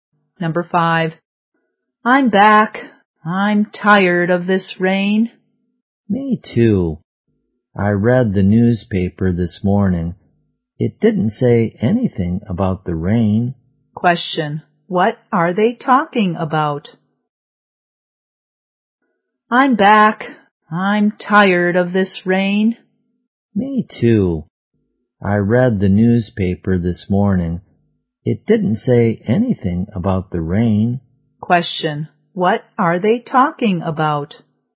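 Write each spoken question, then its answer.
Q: what are they talking about?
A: The weather (the rain)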